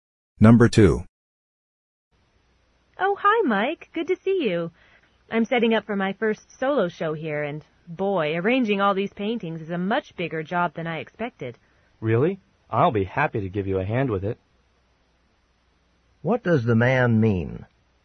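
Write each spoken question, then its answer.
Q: What does the man mean?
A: He offers to help her arrange the paintings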